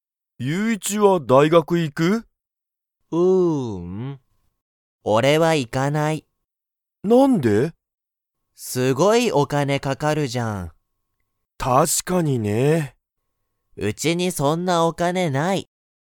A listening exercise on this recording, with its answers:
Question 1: ゆういちは、大学(だいがく)に行(い)きますか?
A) はい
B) いいえ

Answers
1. B

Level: Level 1

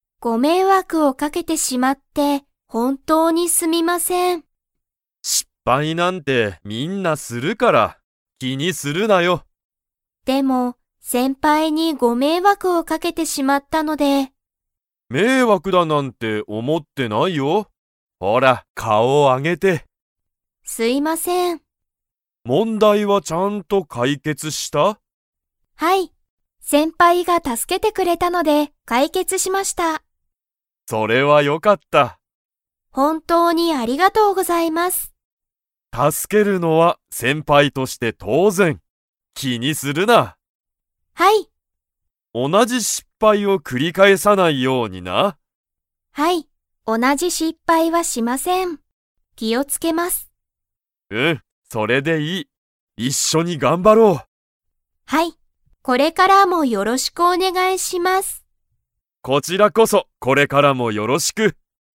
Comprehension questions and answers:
Comprehension Quiz (Skip if you don't understand the conversation yet)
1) 問題もんだいは解決かいけつしましたか?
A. はい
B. いいえ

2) なつみは、同おなじ失敗しっぱいを ように気きを付つける。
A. 見みつけない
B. 気きにしない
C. 繰くり返かえさない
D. お願ねがいしない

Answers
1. A
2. C

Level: Level 4

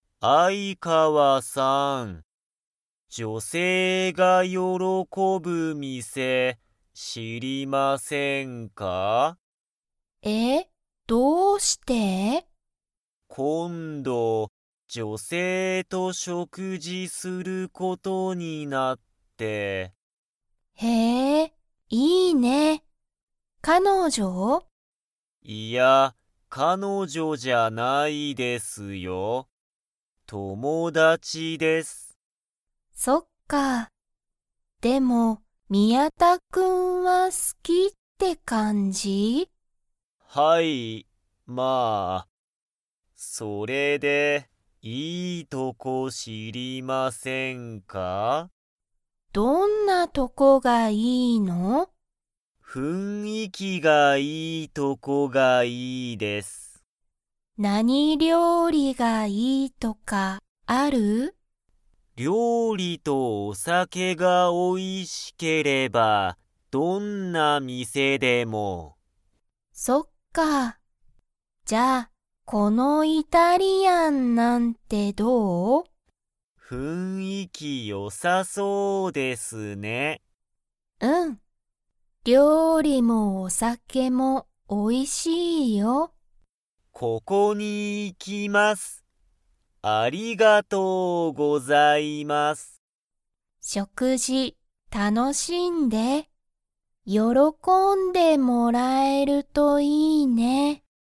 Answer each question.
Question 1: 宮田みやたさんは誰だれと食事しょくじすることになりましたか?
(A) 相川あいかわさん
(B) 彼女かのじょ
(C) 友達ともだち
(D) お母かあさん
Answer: C

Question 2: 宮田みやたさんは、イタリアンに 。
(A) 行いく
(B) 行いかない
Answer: A

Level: Level 3

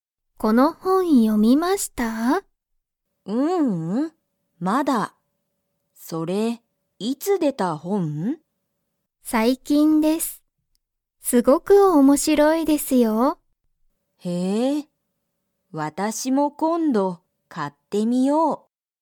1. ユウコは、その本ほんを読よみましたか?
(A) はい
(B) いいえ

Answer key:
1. B

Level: Level 1

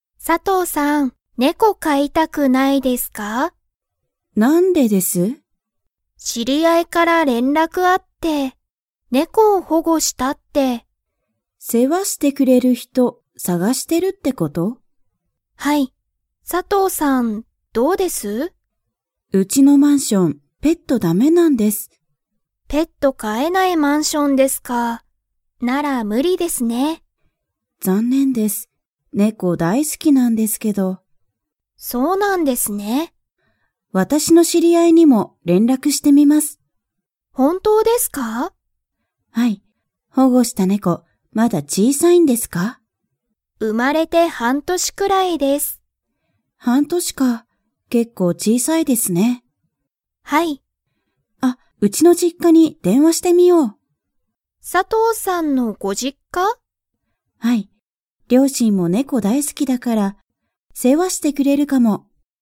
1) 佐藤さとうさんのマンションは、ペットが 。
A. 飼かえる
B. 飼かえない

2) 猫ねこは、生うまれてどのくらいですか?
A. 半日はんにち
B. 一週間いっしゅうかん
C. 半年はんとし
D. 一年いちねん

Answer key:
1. B
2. C

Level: Level 4

